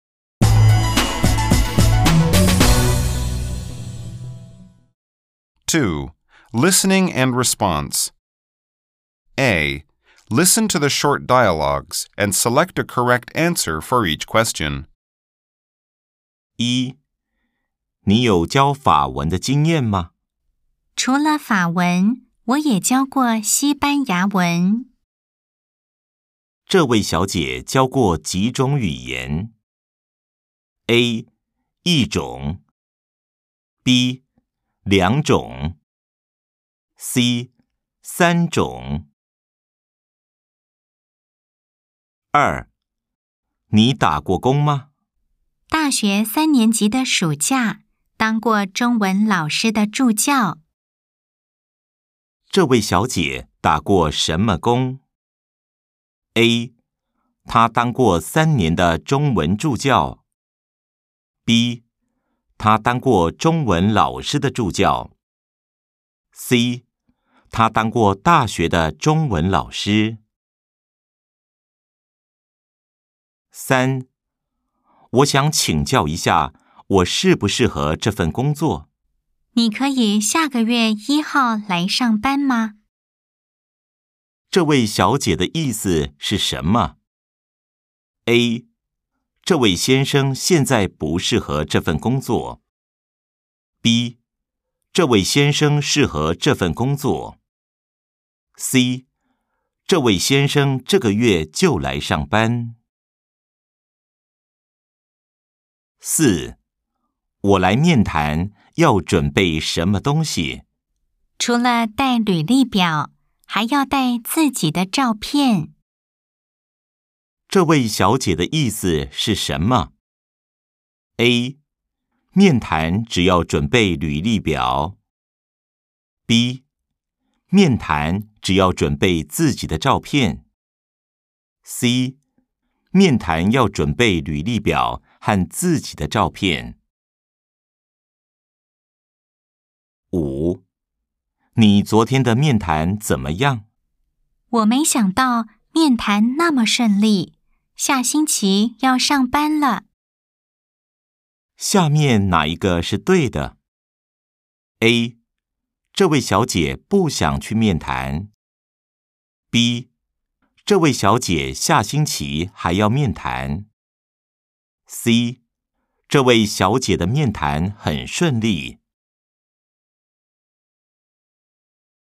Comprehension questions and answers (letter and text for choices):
A. Nghe đoạn hội thoại ngắn và chọn câu trả lời đúng.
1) 這位小姐教過幾種語言?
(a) 一種。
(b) 兩種。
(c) 三種。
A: (b) 兩種。

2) 這位小姐打過什麼工?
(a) 她當過三年的中文助教。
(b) 她當過中文老師的助教。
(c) 她當過大學的中文老師。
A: (b) 她當過中文老師的助教。

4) 這位小姐的意思是什麼?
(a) 面談只要準備履歷表。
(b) 面談只要準備自己的照片。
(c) 面談要準備履歷表和自己的照片。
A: (c) 面談要準備履歷表和自己的照片。

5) 下面哪一個是對的?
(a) 這位小姐不想去面談。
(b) 這位小姐下星期還要面談。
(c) 這位小姐的面談很順利。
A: (c) 這位小姐的面談很順利。